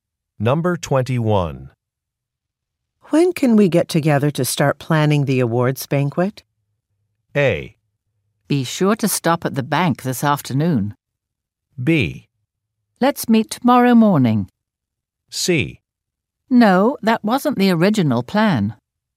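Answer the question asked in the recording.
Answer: B: Let's meet tomorrow morning.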